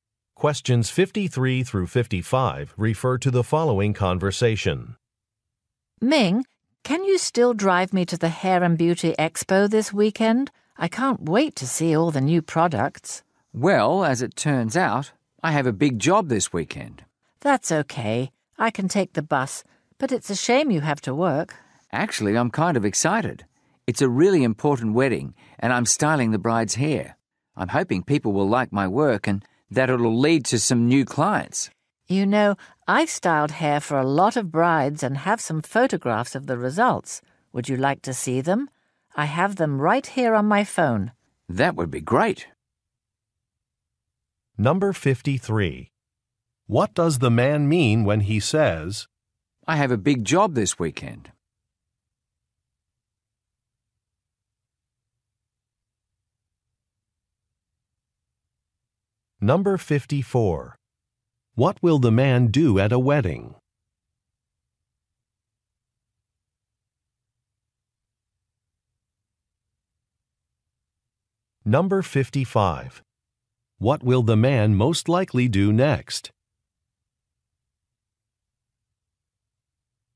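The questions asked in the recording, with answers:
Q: What does the man mean when he says,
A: He can't drive her to the expo

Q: What will the man do at a wedding?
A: Style the bride's hair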